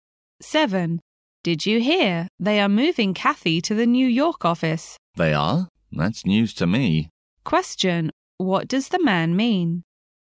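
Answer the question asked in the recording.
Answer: He didn't know Kathy was moving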